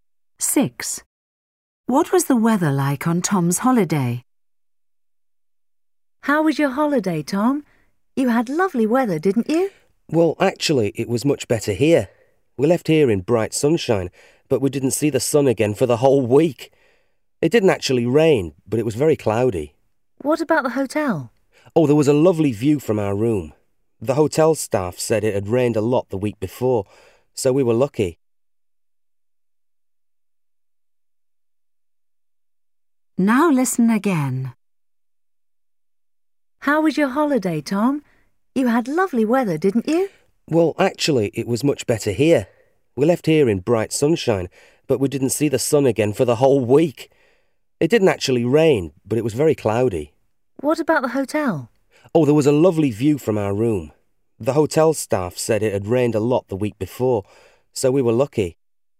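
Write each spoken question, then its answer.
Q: What was the weather like on Tom's holiday?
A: Cloudy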